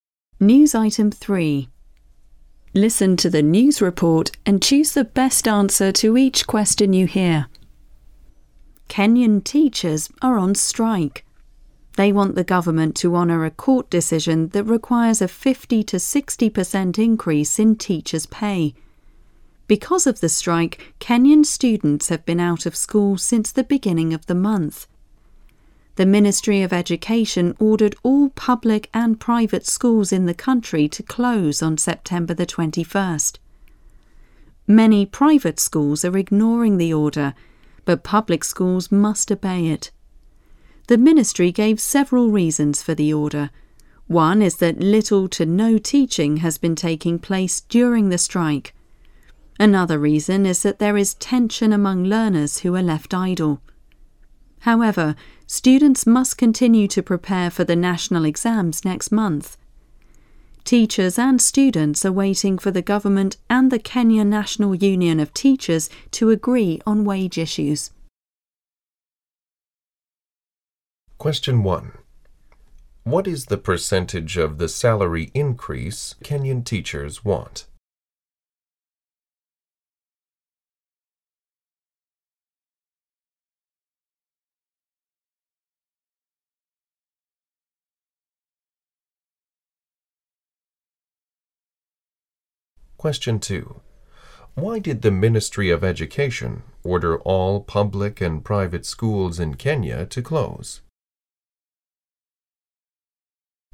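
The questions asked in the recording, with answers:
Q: What is the percentage of the salary increase Kenyan teachers want?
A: 50-60%

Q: Why did the Ministry of Education order all public and private schools in Kenya to close?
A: Little to no teaching was taking place during the strike, and there was tension among idle learners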